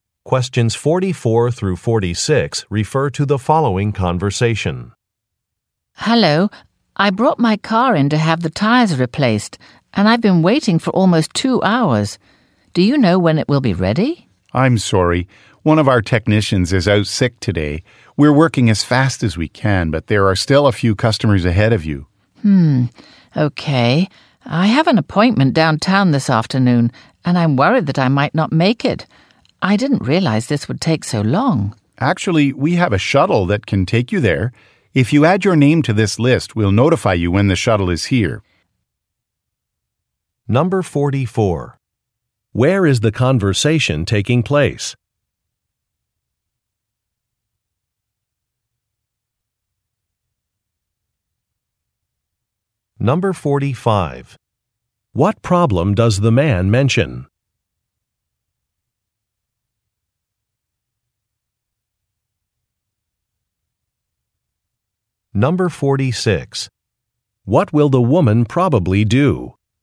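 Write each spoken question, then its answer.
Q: Where is the conversation taking place?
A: At a car repair shop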